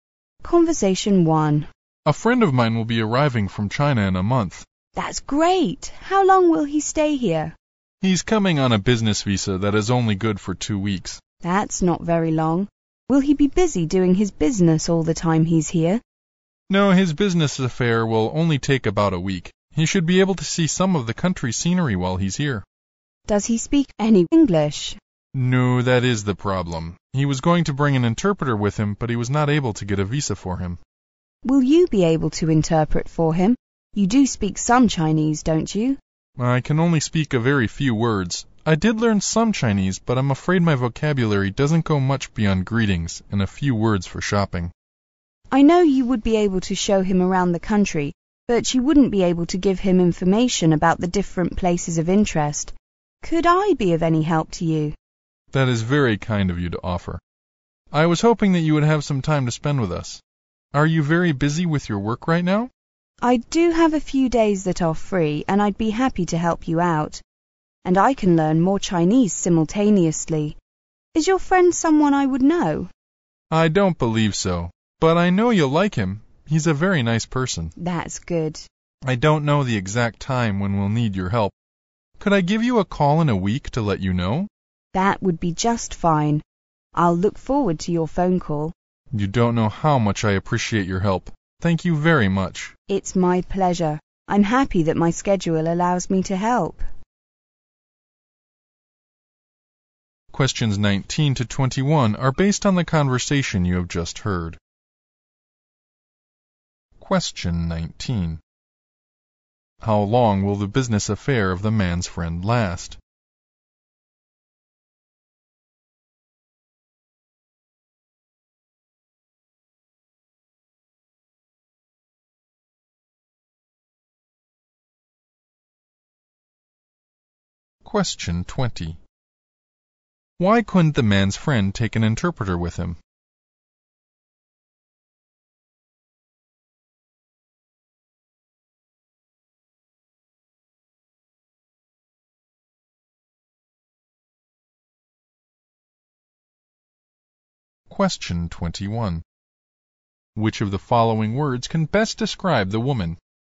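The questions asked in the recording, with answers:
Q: How long will the business affair of the man's friend last?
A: About a week.

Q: Why couldn't the man's friend take an interpreter with him?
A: The interpreter couldn't get a visa.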